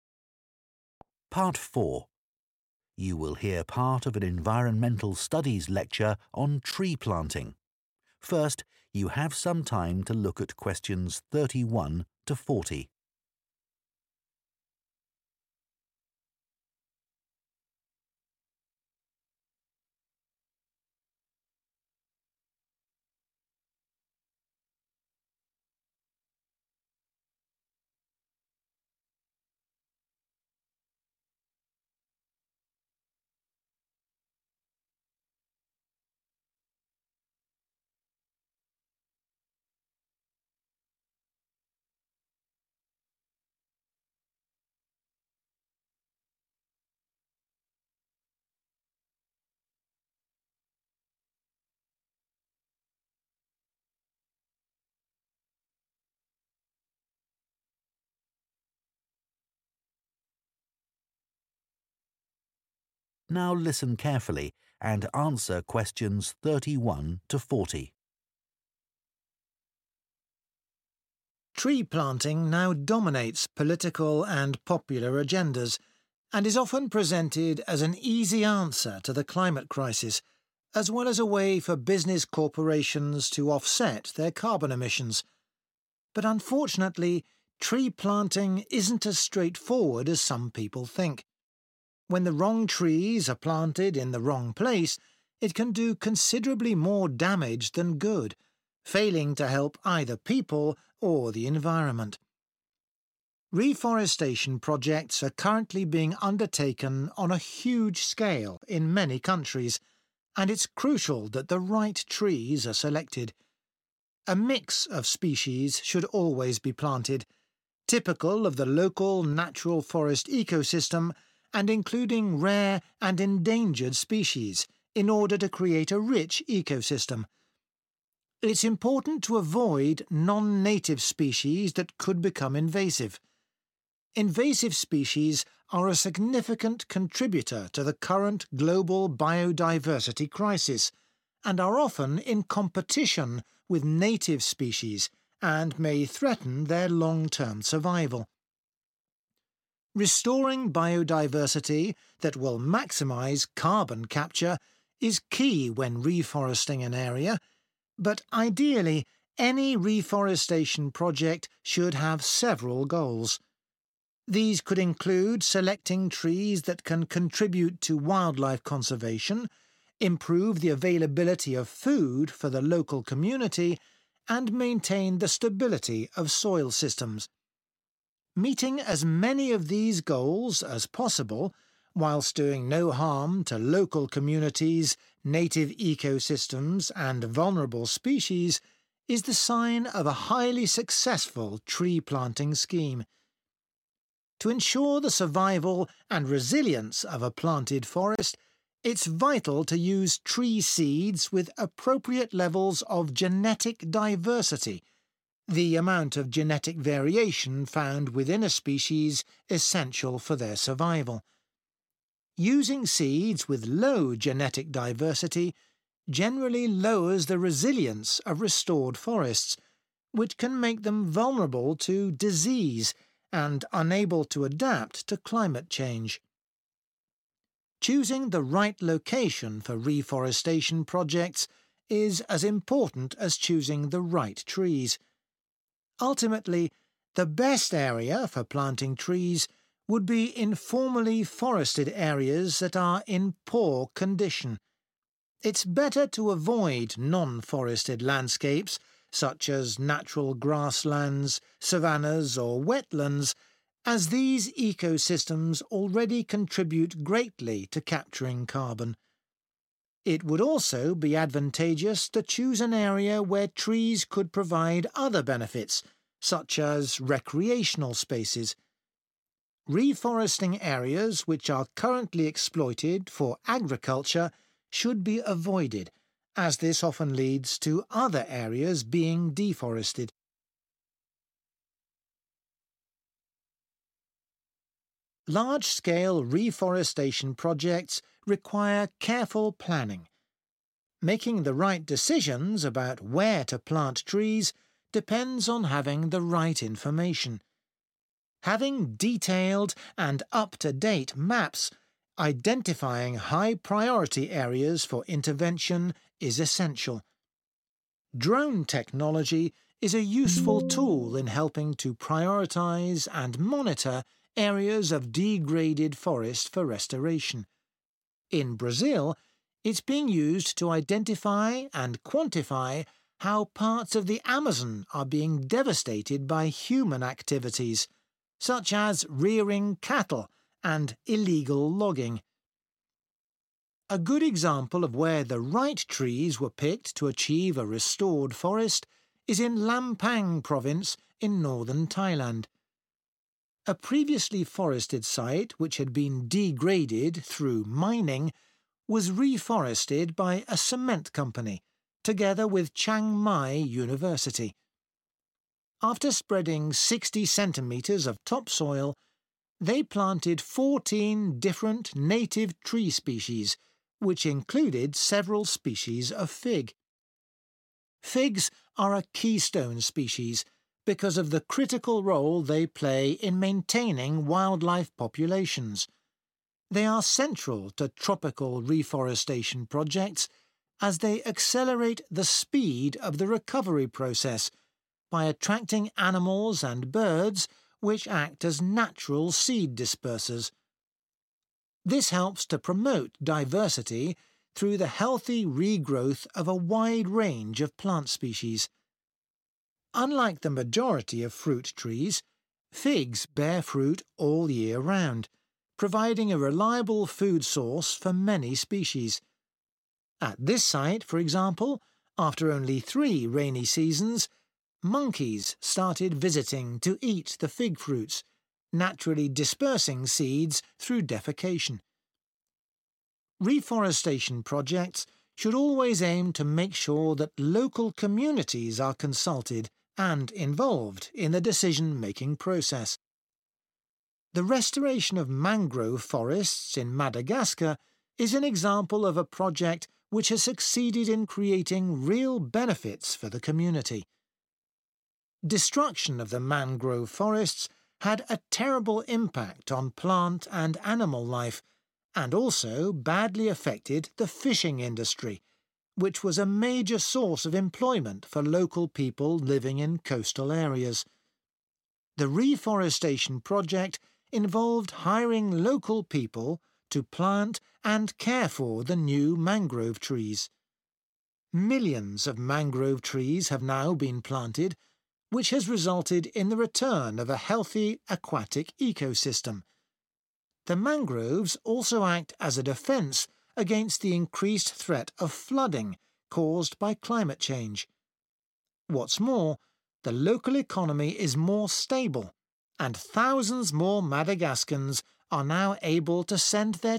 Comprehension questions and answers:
Write ONE WORD ONLY for each answer.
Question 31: not include invasive species because of possible 31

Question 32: aim to capture carbon, protect the environment and provide sustainable sources of 32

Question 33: use tree seeds with a high genetic diversity to increase resistance to 33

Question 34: plant trees on previously forested land which is in a bad condition, not select land which is being used for 34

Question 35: Base planning decisions on information from accurate 35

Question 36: Drones are useful for identifying areas in Brazil which are endangered by keeping 36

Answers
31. competition
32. food
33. disease
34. agriculture
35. maps
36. cattle

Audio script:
Tree planting now dominates political and popular agendas and is often presented as an easy answer to the climate crisis, as well as a way for business corporations to offset their carbon emissions. But unfortunately, tree planting isn't as straightforward as some people think. When the wrong trees are planted in the wrong place, it can do considerably more damage than good, failing to help either people or the environment.
Reforestation projects are currently being undertaken on a huge scale in many countries and it's crucial that the right trees are selected. A mix of species should always be planted, typical of the local natural forest ecosystem and including rare and endangered species in order to create a rich ecosystem. It's important to avoid non-native species (= not include invasive species) that could become invasive. (Q31) Invasive species are a significant contributor to the current global biodiversity crisis and are often in competition with native species and may threaten their long-term survival.
Restoring biodiversity that will maximise carbon capture is key when reforesting an area, but ideally any reforestation project should have several goals. (Q32) These could include selecting trees that can contribute to wildlife conservation (= protect the environment), improve the availability (= provide sustainable sources) of food for the local community and maintain the stability of soil systems. To ensure the survival and resilience of a planted forest, it's vital to use tree seeds with appropriate levels of genetic diversity: the amount of genetic variation found within a species essential for their survival. (Q33) Using seeds with low genetic diversity generally lowers the resilience (= a high genetic diversity to increase resistance) of restored forests, which can make them vulnerable to disease and unable to adapt to climate change.
Choosing the right location for reforestation projects is as important as choosing the right trees. Ultimately, the best area for planting trees would be in formerly forested areas that are in poor condition. It's better to avoid non-forested landscapes such as natural grasslands, savannas or wetlands as these ecosystems already contribute greatly to capturing carbon. It would also be advantageous to choose an area where trees could provide other benefits, such as recreational spaces. (Q34) Reforesting areas (= plant trees on previously forested land) which are currently exploited (= is being used) for agriculture should be avoided (= not select) as this often leads to other areas being deforested.
Large-scale reforestation projects require careful planning. Making the right decisions about where to plant trees depends on having the right information. (Q35) Having detailed and up-to-date (= accurate) maps identifying high-priority areas for intervention is essential. (Q36) In Brazil, it's (= drone technology) being used to identify and quantify how parts of the Amazon are being devastated (= endangered) by human activities such as rearing (= keeping) cattle and illegal logging.
A good example of where the right trees were picked to achieve a restored forest is in Lampang Province in Northern Thailand. A previously forested site which had been degraded through mining was reforested by a cement company together with Chiang Mai University. After spreading 60 cm of topsoil, they planted 14 different native tree species which included several species of fig. Figs are a keystone species because of the critical role (= important) they play in maintaining wildlife populations. (Q37) They are central to tropical reforestation projects as they accelerate (= increasing) the speed of the recovery process by attracting animals and birds which act as natural seed dispersers. Unlike the majority of fruit trees, figs bear fruit all year round, providing a reliable food source for many species. (Q38) At this site, for example, after only three rainy seasons, monkeys started visiting to eat the fig fruits (= attracted to the area), naturally dispersing seeds through defecation.
Reforestation projects should always aim to make sure that local communities are consulted and involved in the decision-making process.
The restoration of mangrove forests in Madagascar is an example of a project which has succeeded in creating real benefits for the community. (Q39) Destruction of the mangrove forests had a terrible impact on plant and animal life, and also badly affected the fishing industry. The reforestation project involved hiring local people to plant and care for the new mangrove trees. Millions of mangrove trees have now been planted which has resulted in the return of a healthy aquatic ecosystem. (Q40) The mangroves also act as a defence against (= protects against) the increased threat (higher risk) of flooding caused by climate change.